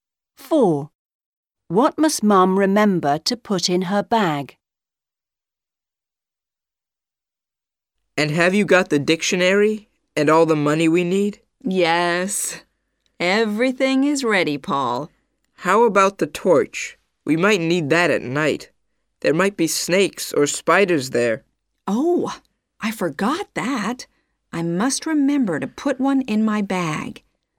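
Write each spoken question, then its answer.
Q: What must Mum remember to put in her bag?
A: a torch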